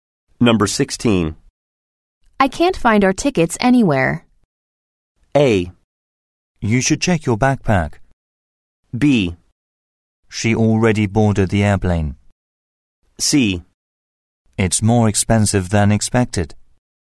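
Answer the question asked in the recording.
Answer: A: You should check your backpack.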